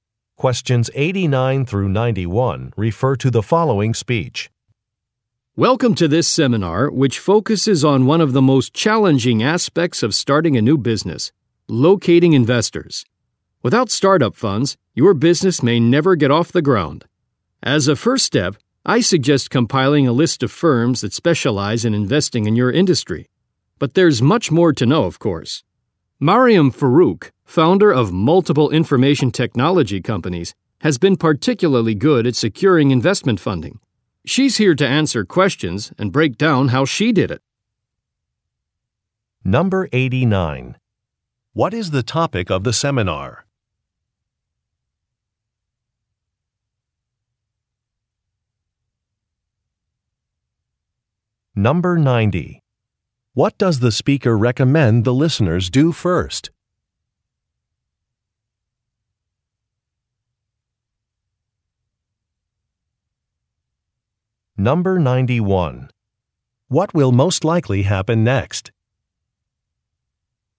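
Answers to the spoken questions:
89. Finding investors for a new business
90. Make a list of firms that invest in their industry
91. Mariam Farouk will answer questions about getting investment funding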